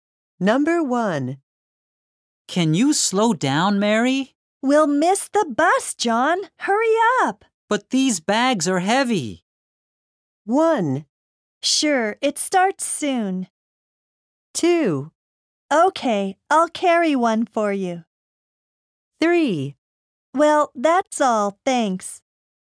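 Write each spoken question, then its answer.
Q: But these bags are heavy.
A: 2: Okay, I'll carry one for you.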